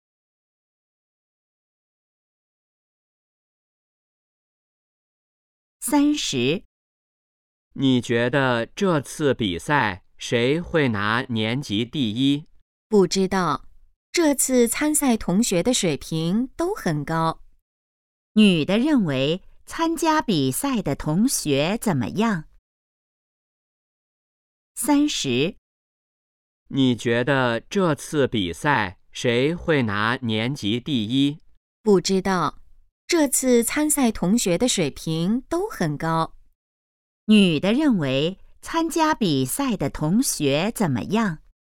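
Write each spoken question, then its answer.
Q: 女的认为参加比赛的同学怎么样?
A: 水平都很高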